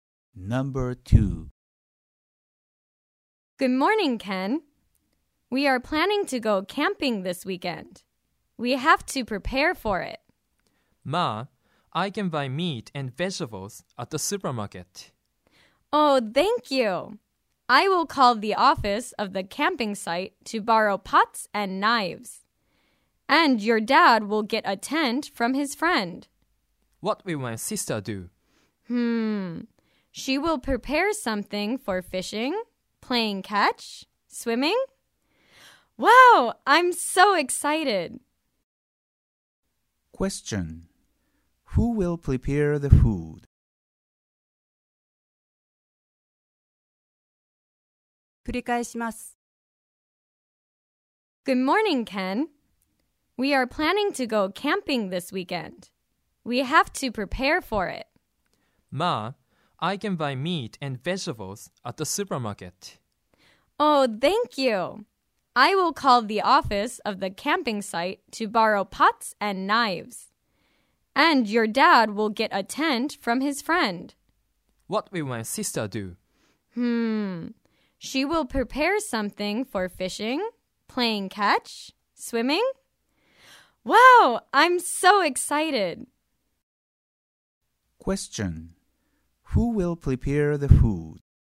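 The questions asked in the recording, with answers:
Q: Question. Who will prepare the food?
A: Ken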